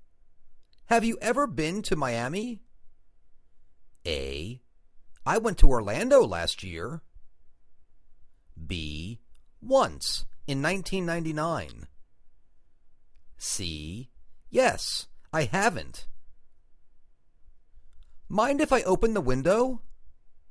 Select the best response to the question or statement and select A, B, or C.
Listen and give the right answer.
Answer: Once, in 1999.